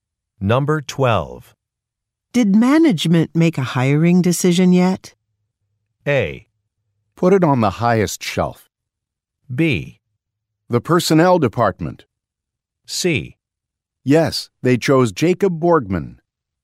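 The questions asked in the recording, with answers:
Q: Did management make a hiring decision yet?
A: C: Yes, they chose Jacob Borgman.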